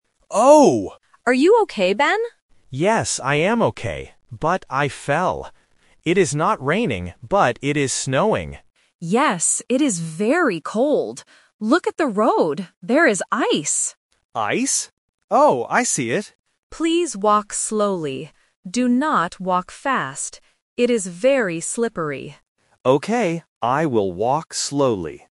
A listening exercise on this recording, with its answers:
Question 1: What is the weather like right now?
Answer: Snowing

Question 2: What is on the road?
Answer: Ice

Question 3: What must Ben do?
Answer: Walk slowly

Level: A1